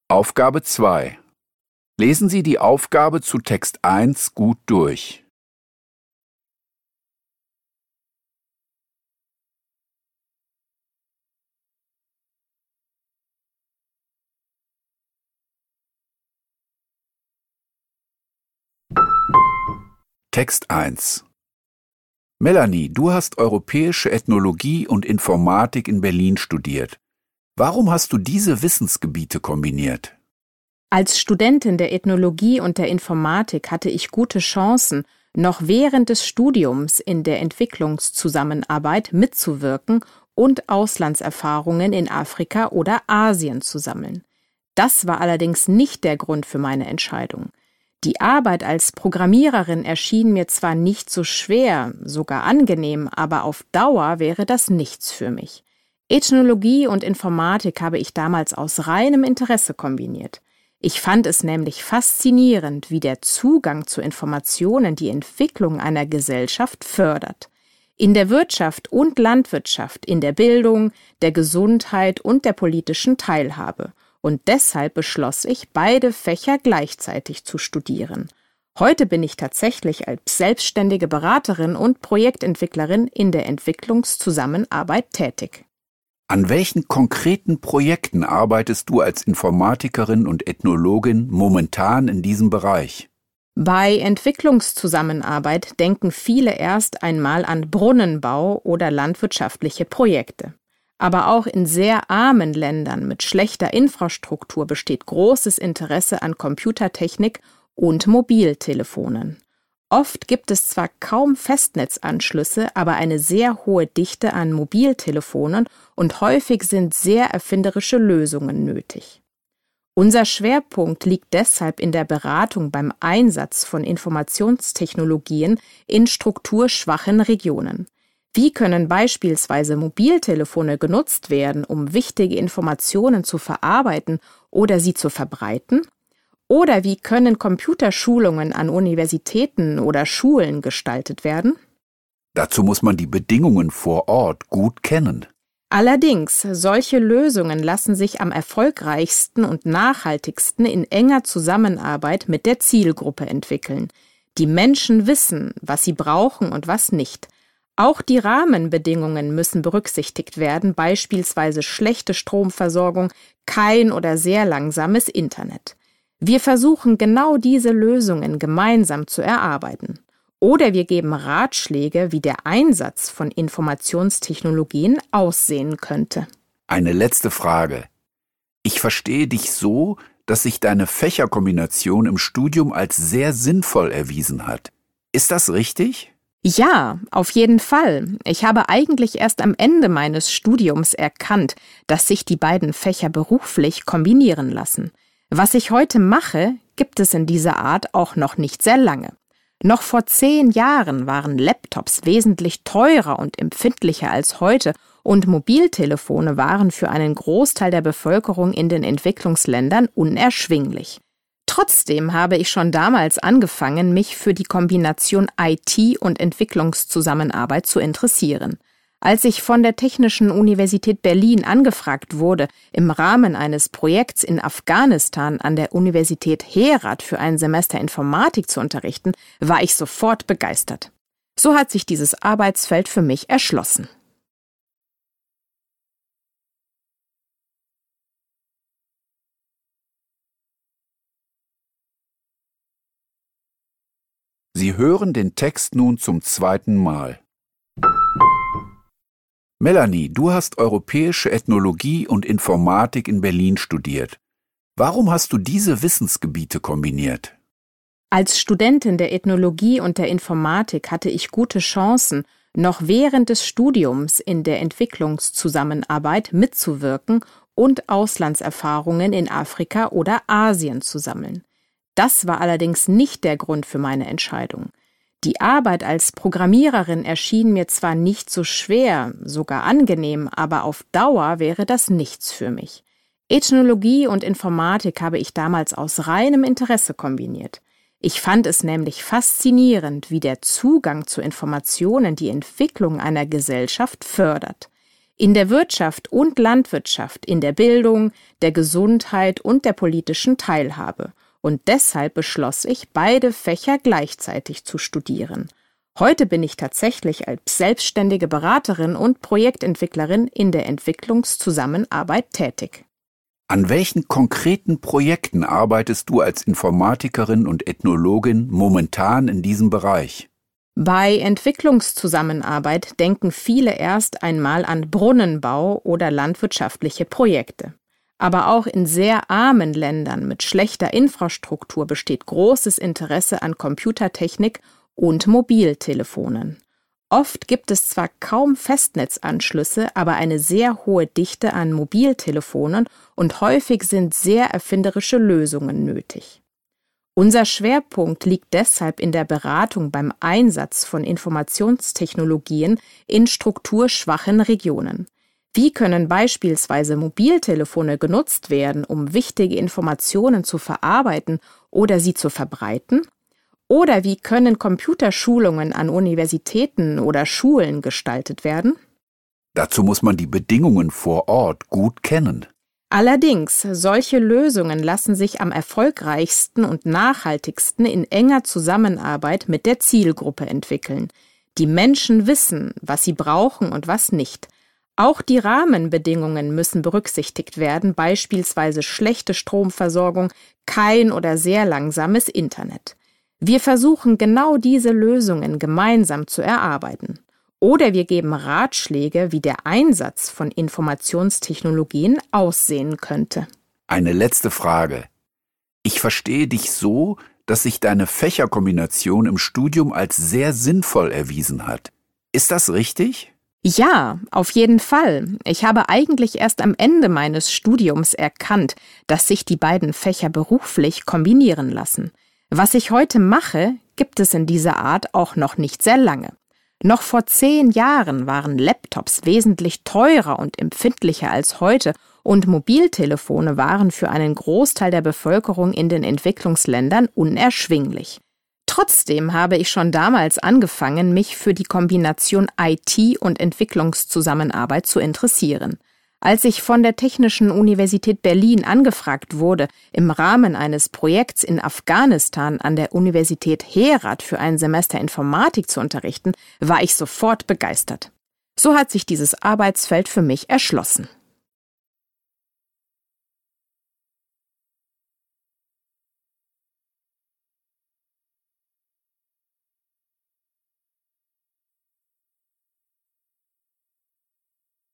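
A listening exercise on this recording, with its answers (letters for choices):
Hören Sie die folgenden zwei Texte, über Entwicklungszusammenarbeit und über Pferde im Zirkus, zweimal. Kreuzen Sie die jeweils richtige Antwort (A, B, C oder D) an. Nur jeweils eine Antwort ist richtig. Die Aufgaben 2.1–2.3 betreffen den ersten Text, die Aufgaben 2.4–2.6 den zweiten Text.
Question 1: Warum entschied sich Melanie, Ethnologie in Verbindung mit Informatik zu studieren?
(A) Sie fand den Job als Programmiererin anstrengend.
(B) Sie konnte Auslandserfahrungen in Europa sammeln.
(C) Sie wollte noch im Studium in der Entwicklungszusammenarbeit tätig sein.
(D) Sie fand den Einfluss der Informatik auf die gesellschaftliche Entwicklung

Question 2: Was steht im Fokus der Projekte von Melanie in den Entwicklungsländern?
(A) Die Entwicklung von Apps für Mobiltelefone.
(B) Die Finanzierung von Brunnenbau und Landwirtschaft.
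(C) Die Nutzungsmöglichkeiten von Informationstechnologien.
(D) Der Anschluss von Universitäten und Schulen an das Internet.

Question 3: In der letzten Aussage informiert Melanie darüber,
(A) wie sie zu ihrem aktuellen Aufgabenbereich gekommen ist.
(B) wie sie im Studium Ethnologie und Informatik kombiniert hat.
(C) warum sie an einer Berliner Universität Informatik unterrichtet.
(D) was sie durch die Entwicklungszusammenarbeit erreichen will.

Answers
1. D
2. C
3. A

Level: Poziom: dwujęzyczny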